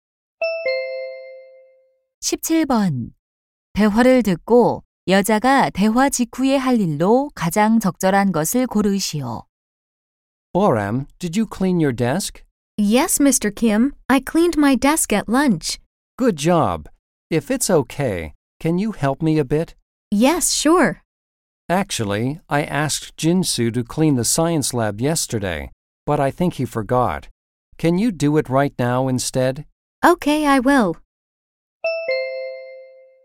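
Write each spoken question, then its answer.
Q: 대화를 듣고 여자가 대화 직후에 할 일로 가장 적절한 것을 고르시오.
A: 과학실 청소하기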